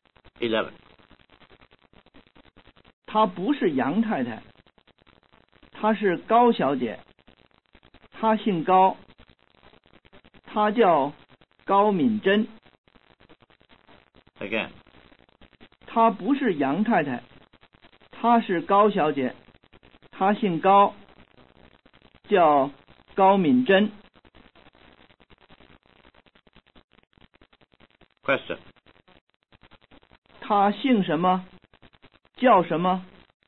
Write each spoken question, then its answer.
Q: 她姓什么?叫什么?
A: 他姓高,他叫敏珍。